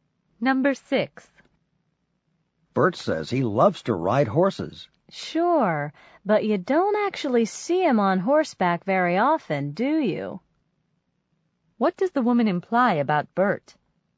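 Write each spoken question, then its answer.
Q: What does the woman imply about Bert?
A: He rarely rides horses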